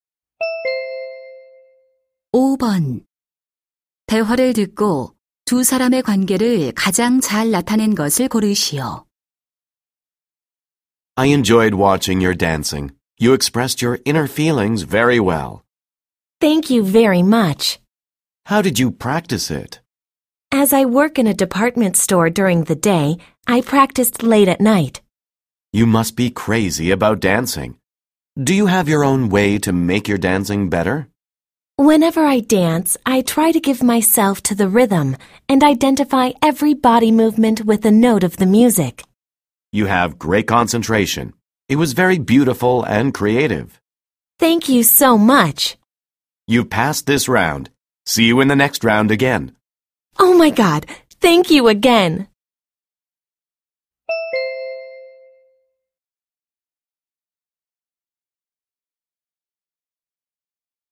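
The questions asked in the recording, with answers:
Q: 대화를 듣고 두 사람의 관계를 가장 잘 나타낸 것을 고르시오.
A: 댄스 오디션 심사위원 - 참가자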